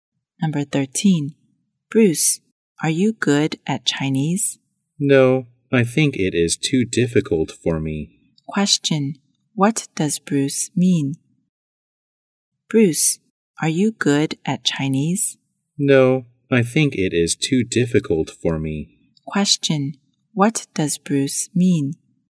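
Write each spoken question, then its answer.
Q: Question, what does Bruce mean?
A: He is not good at Chinese; it is too difficult for him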